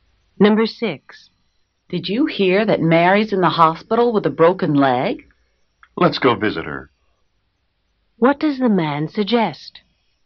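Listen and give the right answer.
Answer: Going to visit Mary in the hospital.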